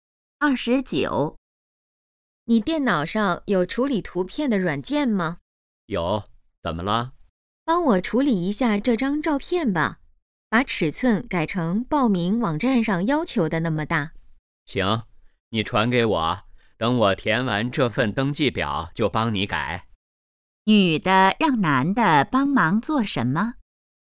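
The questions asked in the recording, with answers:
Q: 女的让男的帮忙做什么?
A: 处理照片,改尺寸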